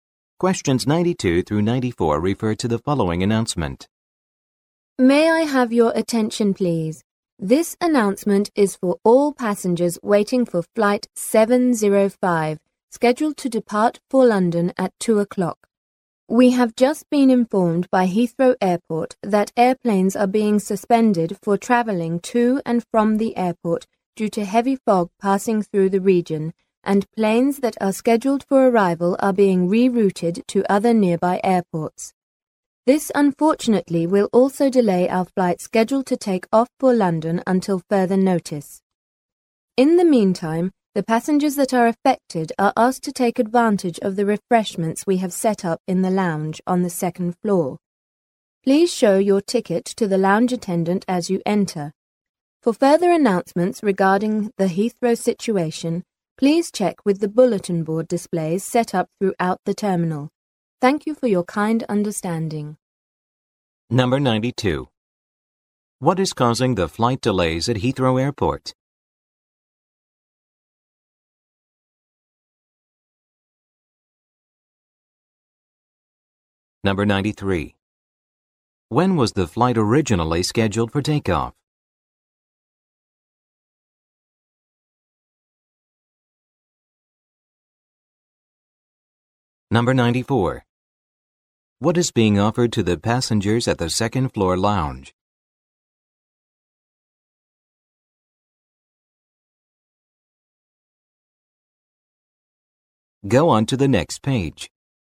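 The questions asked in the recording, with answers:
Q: What is causing the flight delays at Heathrow Airport?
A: Heavy fog

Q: When was the flight originally scheduled for takeoff?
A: At 2 o'clock

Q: What is being offered to the passengers at the second floor lounge?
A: Refreshments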